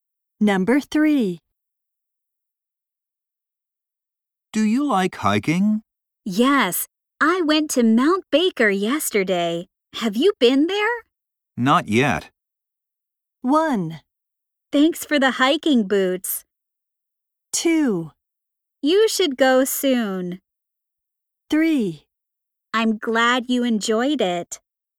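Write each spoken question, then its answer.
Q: Not yet.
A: 2: You should go soon.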